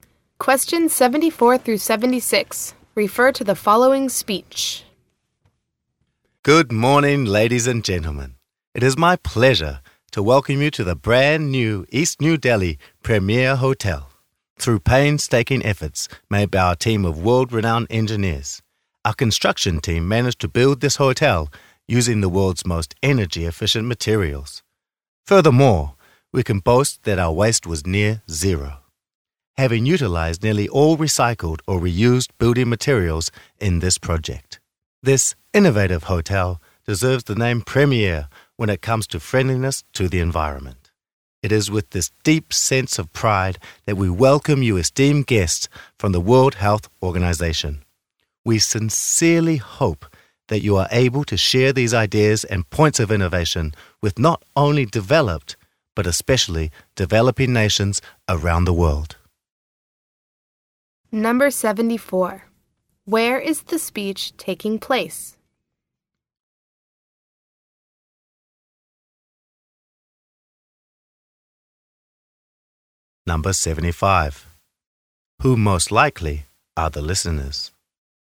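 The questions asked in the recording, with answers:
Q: Where is the speech taking place?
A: At the East New Delhi Premier Hotel

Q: Who most likely are the listeners?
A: Guests from the World Health Organization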